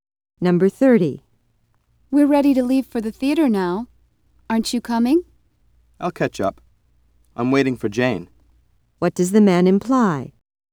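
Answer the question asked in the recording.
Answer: He will go to the theater later, after Jane arrives.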